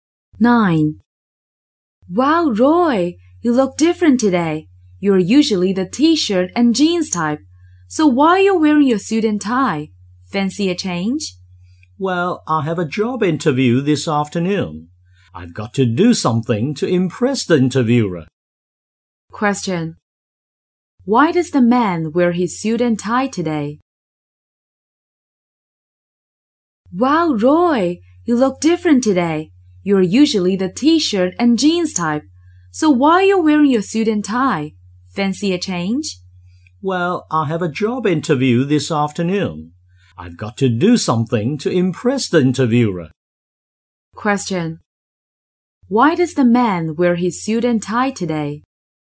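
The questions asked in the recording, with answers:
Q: Why does the man wear his suit and tie today?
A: He has a job interview this afternoon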